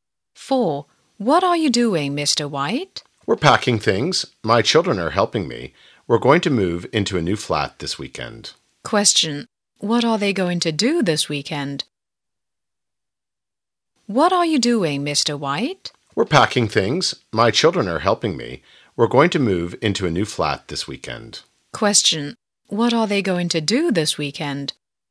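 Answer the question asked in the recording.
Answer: Move into a new flat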